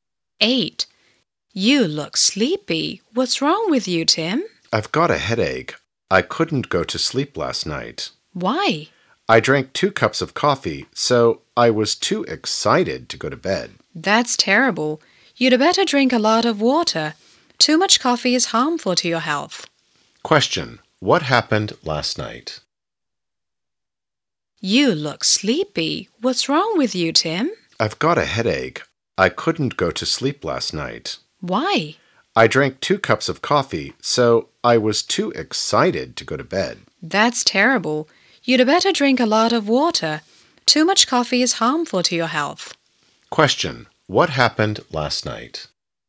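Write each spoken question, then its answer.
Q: What happened last night?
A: Tim drank 2 cups of coffee and couldn't sleep.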